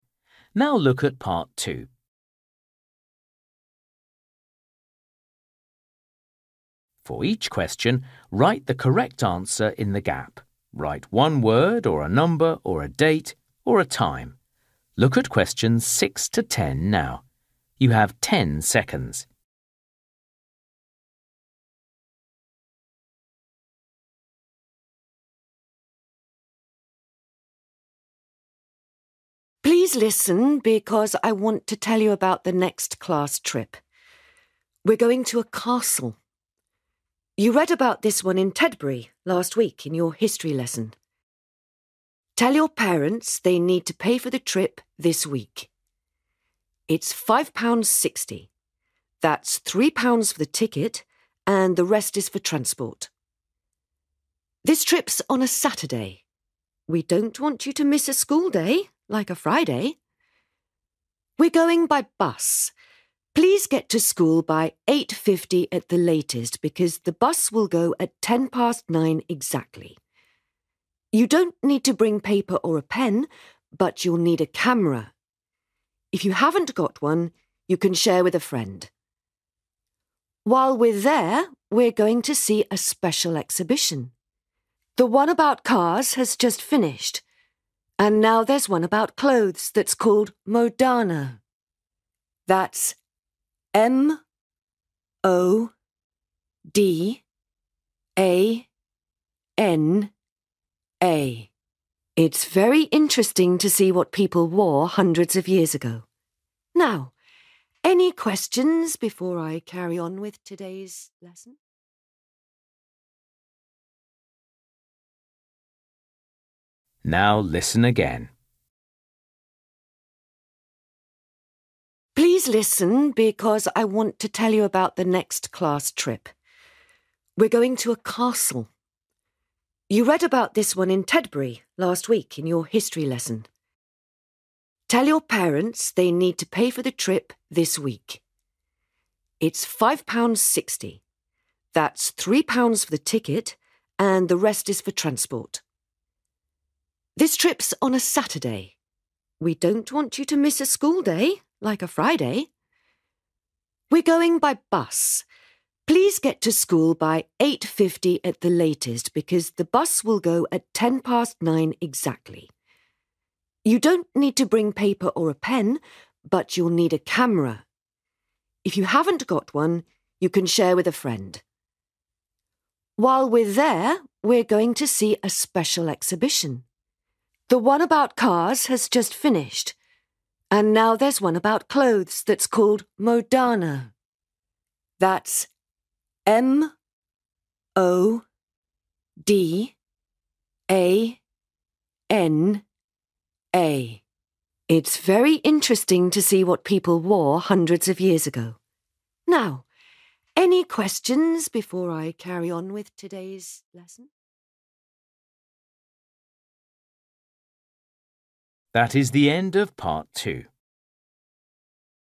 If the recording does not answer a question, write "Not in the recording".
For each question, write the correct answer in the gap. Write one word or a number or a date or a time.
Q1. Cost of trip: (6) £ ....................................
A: 5.60

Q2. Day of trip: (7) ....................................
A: Sat(urday)

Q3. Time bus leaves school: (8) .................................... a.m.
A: 9:10

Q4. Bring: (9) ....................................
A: camera

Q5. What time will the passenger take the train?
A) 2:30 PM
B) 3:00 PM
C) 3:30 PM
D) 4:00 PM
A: Not in the recording

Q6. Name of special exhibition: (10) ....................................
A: Modana

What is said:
Woman: Please listen because I want to tell you about the next class trip. We're going to a castle. You read about this one in Tedbury last week in your history lesson. Tell your parents they need to pay for the trip this week. That's three pounds for the ticket and the rest is for transport.
This trip's on a Saturday. We don't want you to miss a school day, like a Friday.
We're going by bus. Please get to school by eight fifty at the latest because the bus will go at ten past nine exactly.
You don't need to bring paper or a pen, but you'll need a camera. If you haven't got one, you can share with a friend.
While we're there, we're going to see a special exhibition. The one about cars has just finished and now there's one about clothes that's called Modana. That's M-O-D-A-N-A. It's very interesting to see what people wore hundreds of years ago.
Now, any questions ... (fade)

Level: KET (A2)